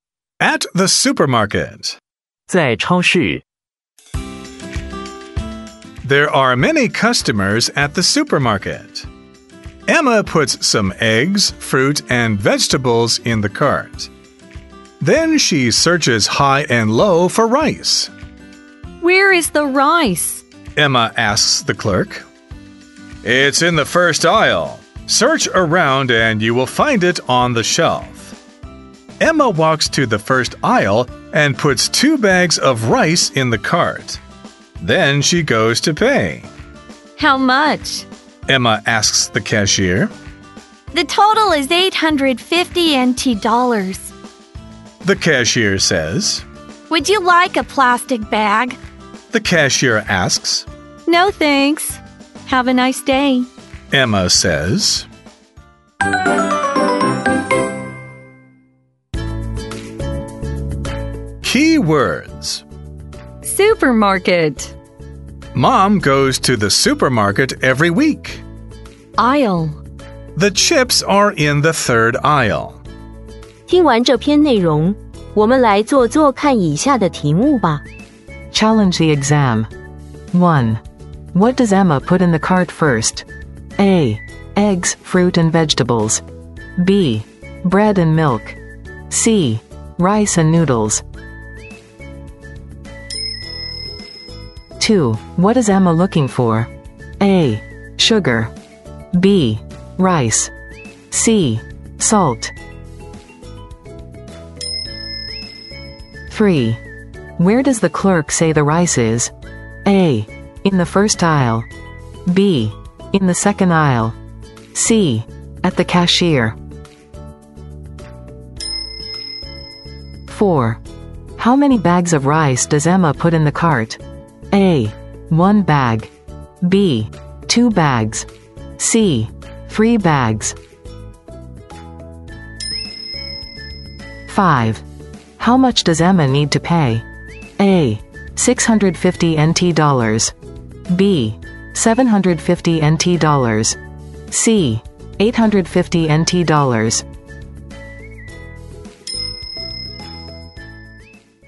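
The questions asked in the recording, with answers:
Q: What does Emma put in the cart first?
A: A: Eggs, fruit and vegetables.

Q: What is Emma looking for?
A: B: Rice.

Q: Where does the clerk say the rice is?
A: A: In the first aisle.

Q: How many bags of rice does Emma put in the cart?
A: B: Two bags.

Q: How much does Emma need to pay?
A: C: 850 NT dollars.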